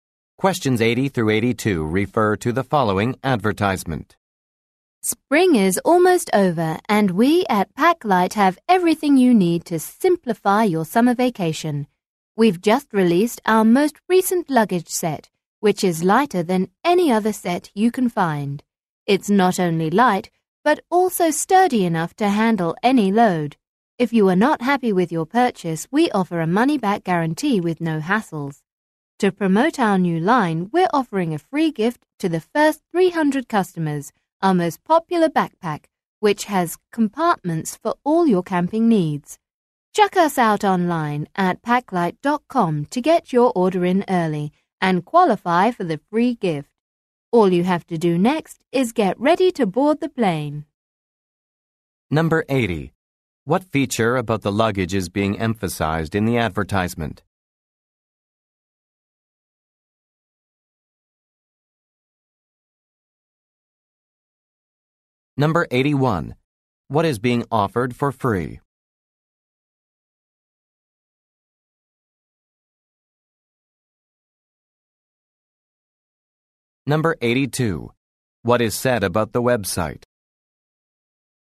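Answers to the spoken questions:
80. It is very light
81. A backpack
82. Early orders there qualify for the free gift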